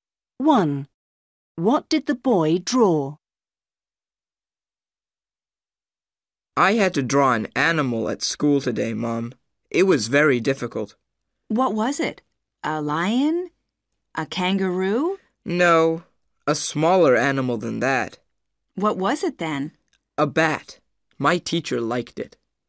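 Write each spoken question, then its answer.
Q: What did the boy draw?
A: A bat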